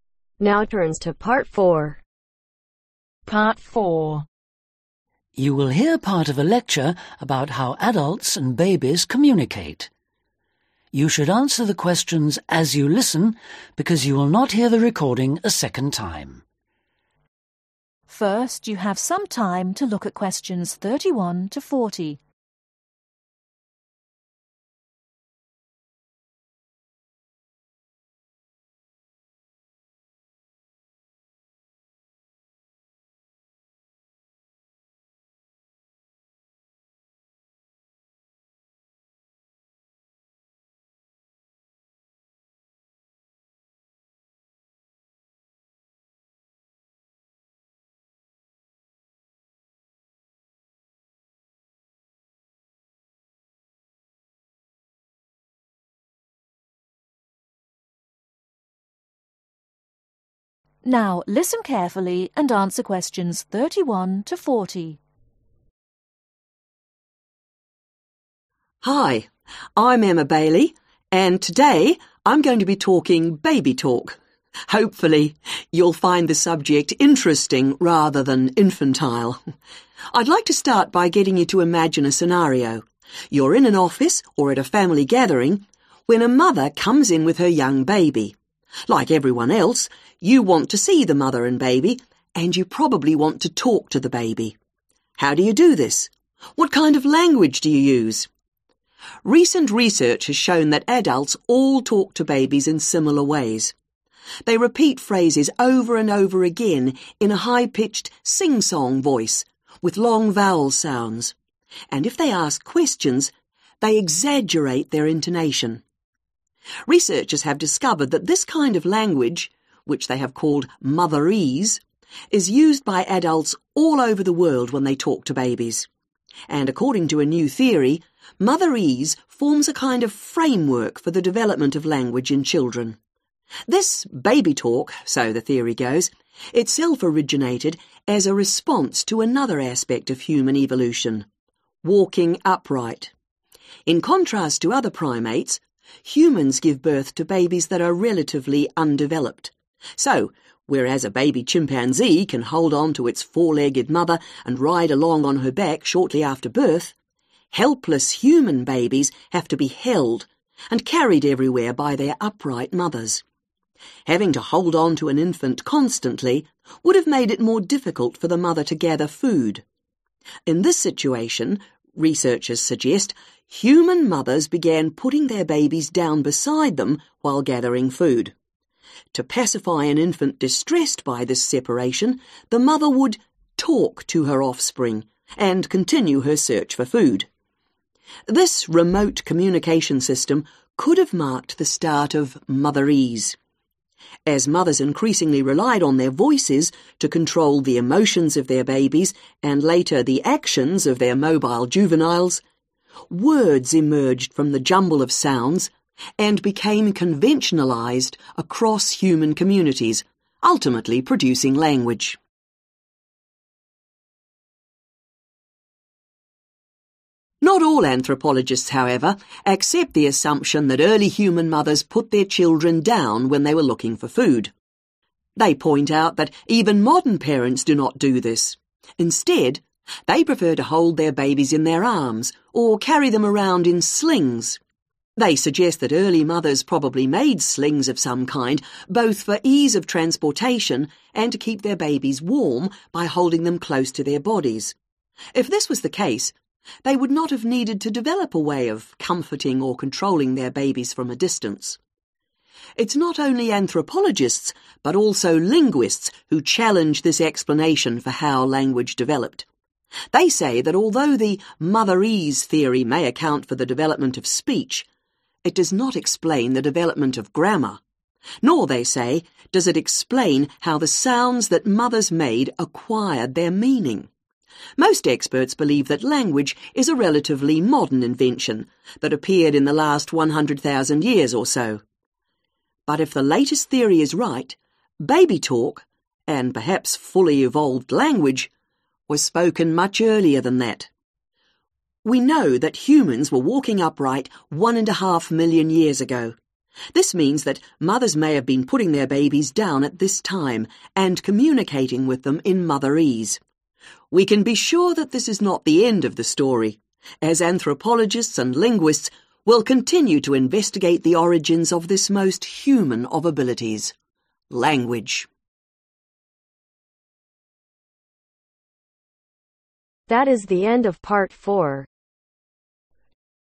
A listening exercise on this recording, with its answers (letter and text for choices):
Complete the sentences below. Write ONE WORD ONLY for each answer.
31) When talking to babies adults ............ phrases several times.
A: Repeat

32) 'Mothers' provides a kind of ............ which allows language to develop in children.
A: Framework

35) Language began as sounds became standardized into ............ .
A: Words

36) Why might mothers have put their babies in slings ?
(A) to transport them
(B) to protect them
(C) to control them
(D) to keep them warm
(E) to communicate with them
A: (A) to transport them

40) What is the speaker's main purpose ?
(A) how mothers talk to their babies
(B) compare how humans look after young age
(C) to explain a new theory of origin of human language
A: (C) to explain a new theory of origin of human language